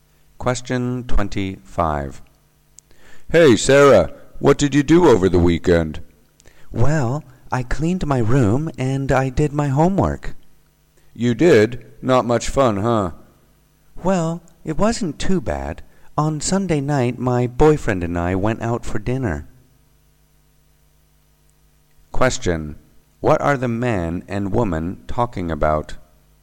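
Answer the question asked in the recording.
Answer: What Sarah did over the weekend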